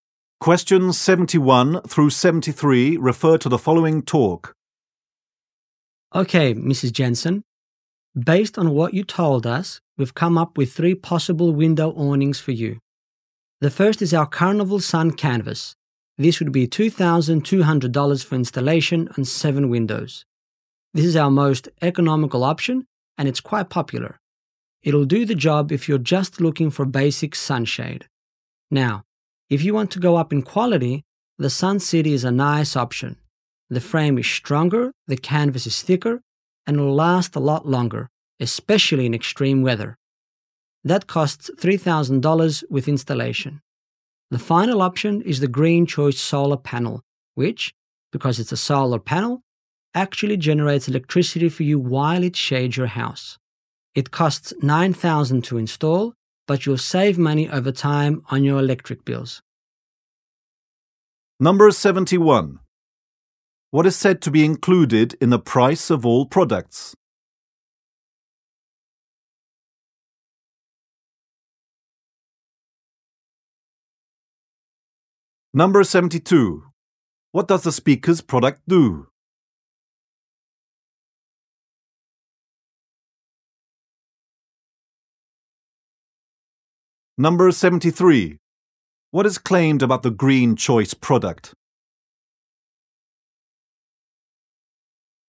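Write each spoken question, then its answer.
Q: What is said to be included in the price of all products?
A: Installation

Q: What does the speaker's product do?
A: Shades windows (window awnings)

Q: What is claimed about the Green Choice product?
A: It generates electricity and saves money on electric bills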